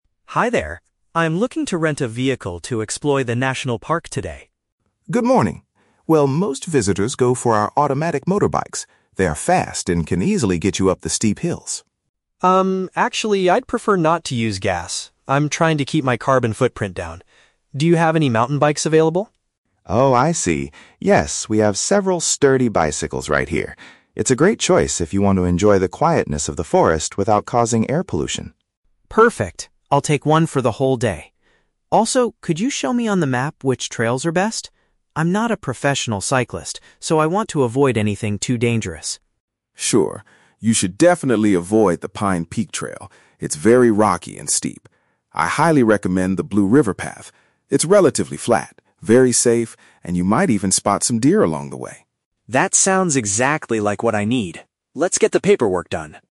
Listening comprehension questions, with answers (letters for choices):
Listen to a conversation between a tourist and a rental shop owner. Choose the correct answer (A, B, or C) for each question.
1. Why does Liam refuse to rent a motorbike?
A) He wants to avoid creating harmful air pollution.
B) He believes that motorbikes are too fast and dangerous.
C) He does not have enough money to pay for the rental fee.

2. How does Mr. Carter feel about Liam's choice of vehicle?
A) He is worried because the bicycle cannot climb the steep hills.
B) He supports it because it offers a very peaceful experience.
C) He is disappointed because bicycles are much cheaper to rent.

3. Which route does Mr. Carter advise Liam to take?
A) The path that goes over the rocky mountains.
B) The road that leads toward the local town center.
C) The trail that runs next to the water.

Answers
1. A
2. B
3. C

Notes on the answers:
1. Liam says he prefers "not to use gas" and wants to "keep his carbon footprint down" (paraphrased as "avoid creating harmful air pollution").
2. Mr. Carter agrees with the choice, saying it's a "great choice" if Liam wants to "enjoy the quietness of the forest" (paraphrased as "offers a very peaceful experience").
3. Mr. Carter highly recommends the "Blue River path" because it is flat and safe. "River path" is paraphrased as "trail that runs next to the water."

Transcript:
Liam: Hi there. I'm looking to rent a vehicle to explore the national park today.
Carter: Good morning! Well, most visitors go for our automatic motorbikes. They are fast and can easily get you up the steep hills.
Liam: Um, actually, I'd prefer not to use gas. I'm trying to keep my carbon footprint down. Do you have any mountain bikes available?
Carter: Oh, I see. Yes, we have several sturdy bicycles right here. It's a great choice if you want to enjoy the quietness of the forest without causing air pollution.
Liam: Perfect. I'll take one for the whole day. Also, could you show me on the map which trails are best? I'm not a professional cyclist, so I want to avoid anything too dangerous.
Carter: Sure. You should definitely avoid the Pine Peak trail—it's very rocky and steep. I highly recommend the Blue River path. It's relatively flat, very safe, and you might even spot some deer along the way.